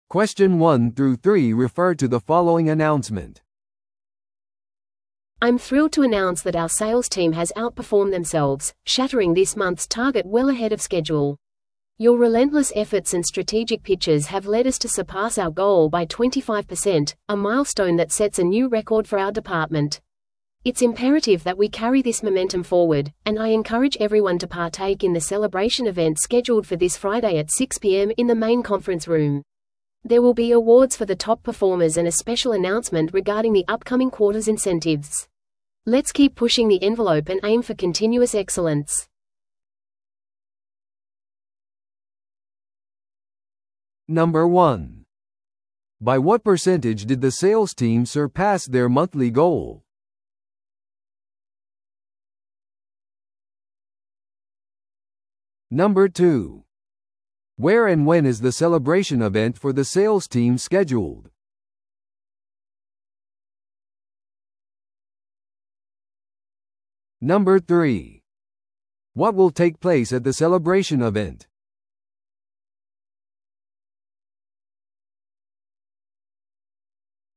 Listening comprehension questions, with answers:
Listen to the audio below and answer the questions.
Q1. By what percentage did the sales team surpass their monthly goal?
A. 10%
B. 15%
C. 20%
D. 25%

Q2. Where and when is the celebration event for the sales team scheduled?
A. 木曜日の6pmに本部の会議室で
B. 金曜日の6pmに本部の会議室で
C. 金曜日の6pmに食堂で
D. 金曜日の6pmにオンラインで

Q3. What will take place at the celebration event?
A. チームビルディングワークショップ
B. 営業戦略のレビュー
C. トップパフォーマーへの表彰と特別な発表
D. 新しい営業マネージャーの選出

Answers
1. D. 25%
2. B. 金曜日の6pmに本部の会議室で
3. C. トップパフォーマーへの表彰と特別な発表

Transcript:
I'm thrilled to announce that our sales team has outperformed themselves, shattering this month's target well ahead of schedule. Your relentless efforts and strategic pitches have led us to surpass our goal by 25%, a milestone that sets a new record for our department. It's imperative that we carry this momentum forward, and I encourage everyone to partake in the celebration event scheduled for this Friday at 6pm in the main conference room. There will be awards for the top performers and a special announcement regarding the upcoming quarter's incentives. Let's keep pushing the envelope and aim for continuous excellence.

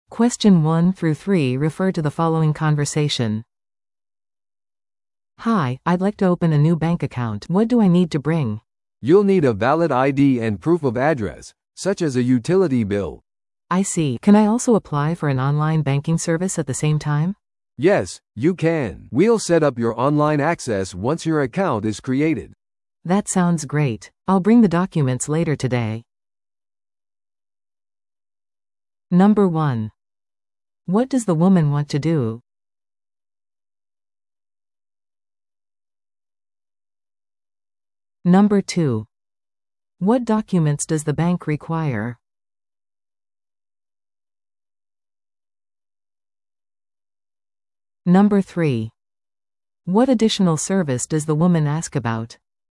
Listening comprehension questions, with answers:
Listen to the audio below and answer the questions.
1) What does the woman want to do?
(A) ローンを申し込む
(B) 新しい銀行口座を開設する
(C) 紛失したカードを報告する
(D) 外貨を両替する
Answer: (B) 新しい銀行口座を開設する

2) What documents does the bank require?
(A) 有効な身分証明書と住所証明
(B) 紹介状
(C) 事業許可証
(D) クレジットレポート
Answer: (A) 有効な身分証明書と住所証明

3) What additional service does the woman ask about?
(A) クレジットカード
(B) 普通預金口座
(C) オンラインバンキング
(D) 貸金庫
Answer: (C) オンラインバンキング

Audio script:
A: "Hi, I'd like to open a new bank account. What do I need to bring?"
B: "You'll need a valid ID and proof of address, such as a utility bill."
A: "I see. Can I also apply for an online banking service at the same time?"
B: "Yes, you can. We'll set up your online access once your account is created."
A: "That sounds great. I'll bring the documents later today."

